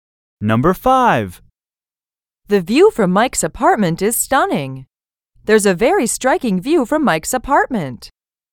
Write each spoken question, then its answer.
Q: There's a very striking view from Mike's apartment.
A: Same is the correct answer.